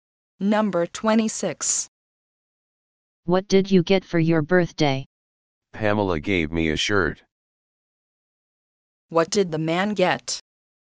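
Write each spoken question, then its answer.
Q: What did the man get?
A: A shirt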